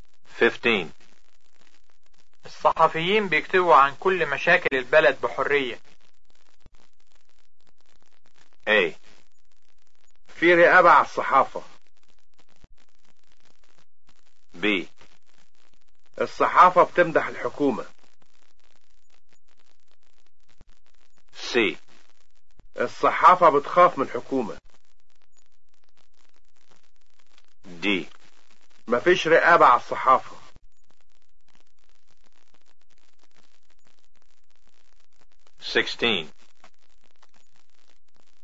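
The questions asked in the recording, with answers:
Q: الصحفيين بيكتبوا عن كل مشاكل البلد بحرية.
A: D: مفيش رقابة على الصحافة.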